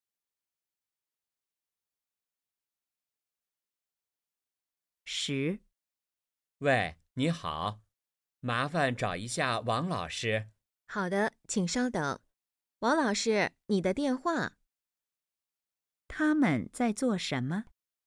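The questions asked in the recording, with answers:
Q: 他们在做什么?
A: 打电话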